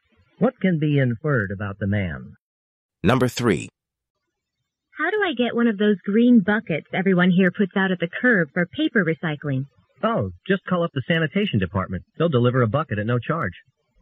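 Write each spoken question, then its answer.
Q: What does the man suggest the woman do?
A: Call the sanitation department.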